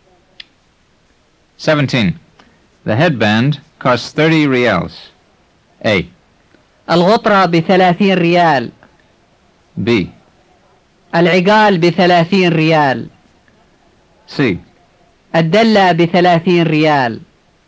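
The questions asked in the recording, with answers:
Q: The headband costs 30 reals.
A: B: العقال بثلاثين ريال.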